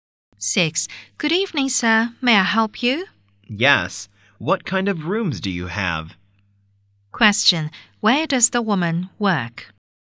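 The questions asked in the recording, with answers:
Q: where does the woman work?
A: In a hotel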